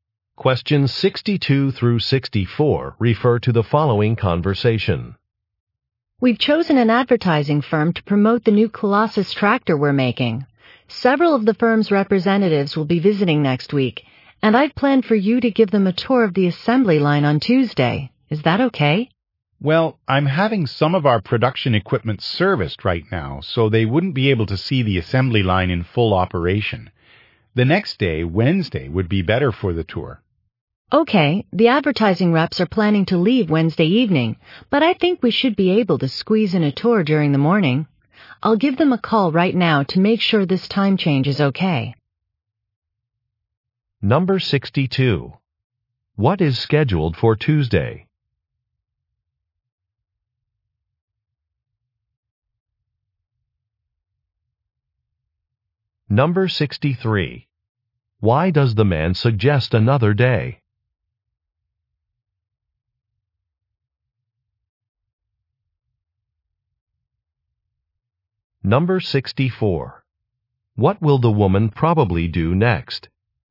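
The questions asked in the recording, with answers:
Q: What is scheduled for Tuesday?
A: An assembly line tour for advertising reps

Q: Why does the man suggest another day?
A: Production equipment is being serviced

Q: What will the woman probably do next?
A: Call the advertising representatives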